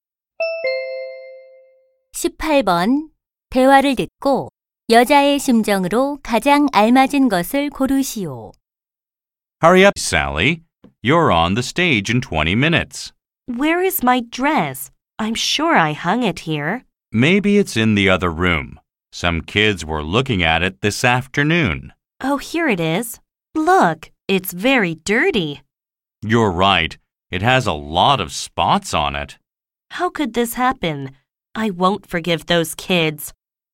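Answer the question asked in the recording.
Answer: 화가 남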